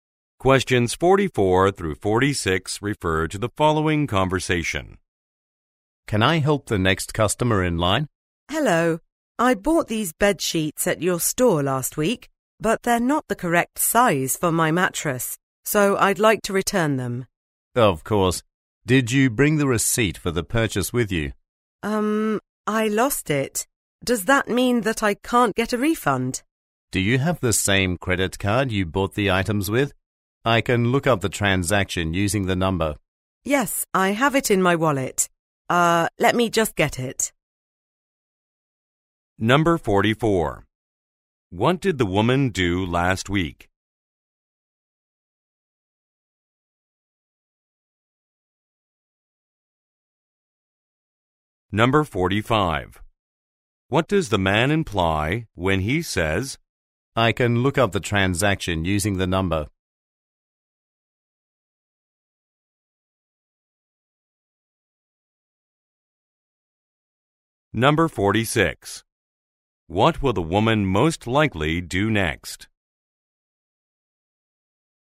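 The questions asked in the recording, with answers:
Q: What did the woman do last week?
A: She bought bed sheets at the store.

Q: What does the man imply when he says, I can look up the transaction using the number?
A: She can still get a refund without the receipt, using her credit card.

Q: What will the woman most likely do next?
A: Take her credit card out of her wallet.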